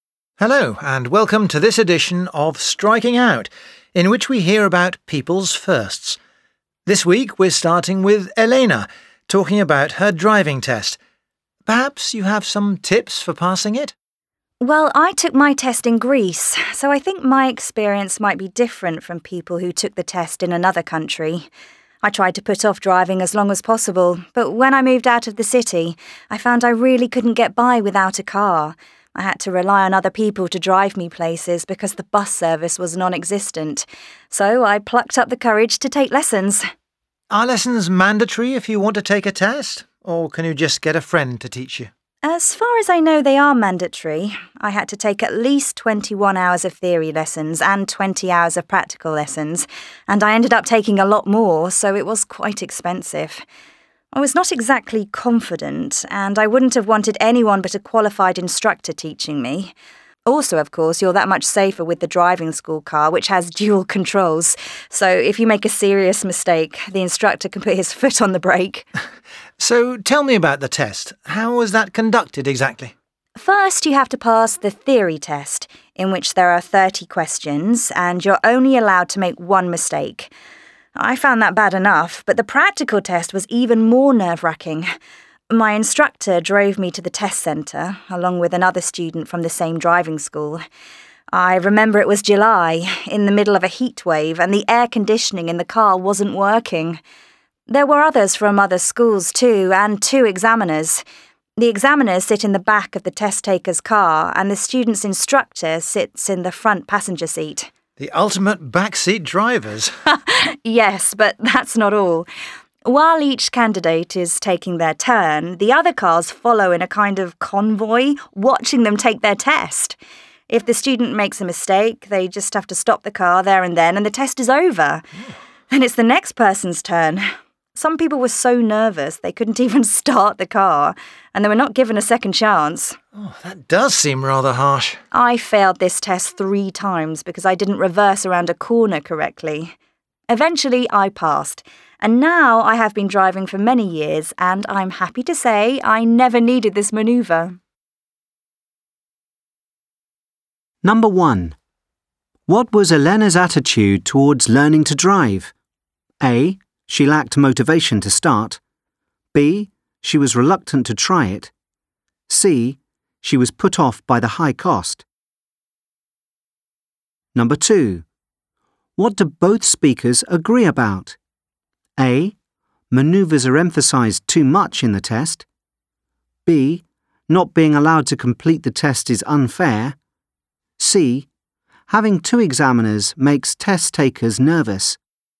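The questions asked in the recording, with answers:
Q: What was Elena's attitude towards learning to drive?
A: B: She was reluctant to try it.

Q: What do both speakers agree about?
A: B: Not being allowed to complete the test is unfair.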